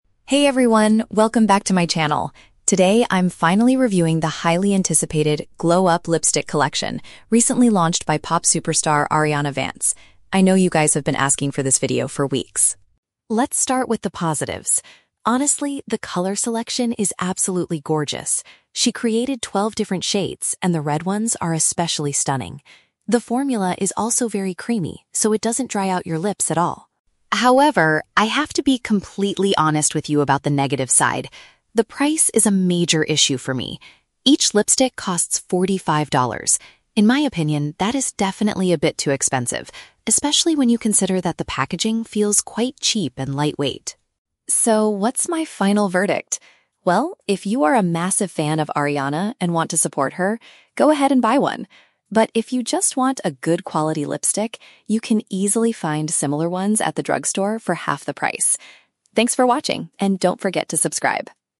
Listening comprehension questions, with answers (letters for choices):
Listen to a beauty vlogger reviewing a product. Choose the correct answer (A, B, or C) for each question.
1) What does the vlogger like most about the new lipsticks?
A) They come in a variety of beautiful colors.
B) They are designed with heavy, high-quality packaging.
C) They stay on the lips for a very long time without fading.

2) Why does the vlogger criticize the product?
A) Because the lipstick makes the lips feel very dry.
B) Because she believes the cost is unreasonably high.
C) Because she strongly dislikes the pop star's recent music.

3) What is the vlogger's final advice to her viewers?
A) Everyone should buy the whole collection to support the singer.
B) People can purchase equally good makeup for less money elsewhere.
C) Fans should wait a few months for the brand to offer a discount.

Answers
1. A
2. B
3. B

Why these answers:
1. The vlogger says, "the color selection is absolutely gorgeous" (which paraphrases to "come in a variety of beautiful colors"). Why the traps are wrong: (B) is a trap. The vlogger explicitly complains that the packaging feels "quite cheap and lightweight." (C) is a plausible feature of a good lipstick, but she only mentions it is "creamy" and doesn't dry out lips, not how long it lasts.
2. The vlogger states that the price is forty-five dollars and it is "definitely a bit too expensive" (which means the cost is unreasonably high). Why the traps are wrong: (A) is a trap. She says the exact opposite: "it doesn't dry out your lips at all." (C) is a trap. She mentions the pop star, but never criticizes her music.
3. At the end, she says, "you can easily find similar ones at the drugstore for half the price" (which paraphrases to purchasing equally good makeup for less money elsewhere). Why the traps are wrong: (A) is a trap. She says fans can "buy one" to support her, but doesn't tell everyone to buy the whole collection. (C) is a plausible shopping strategy, but waiting for a discount is never mentioned.

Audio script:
Vlogger: "Hey everyone, welcome back to my channel! Today, I'm finally reviewing the highly anticipated 'Glow Up' lipstick collection, recently launched by pop superstar, Ariana Vance. I know you guys have been asking for this video for weeks.
Let's start with the positives. Honestly, the color selection is absolutely gorgeous. She created twelve different shades, and the red ones are especially stunning. The formula is also very creamy, so it doesn't dry out your lips at all.
However, I have to be completely honest with you about the negative side. The price is a major issue for me. In my opinion, that is definitely a bit too expensive, especially when you consider that the packaging feels quite cheap and lightweight.
So, what's my final verdict? Well, if you are a massive fan of Ariana and want to support her, go ahead and buy one. But if you just want a good quality lipstick, you can easily find similar ones at the drugstore for half the price. Thanks for watching, and don't forget to subscribe!"